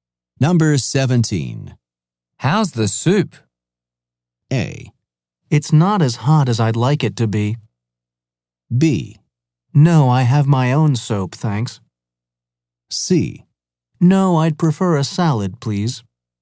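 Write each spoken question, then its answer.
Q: How's the soup?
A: A: It's not as hot as I'd like it to be.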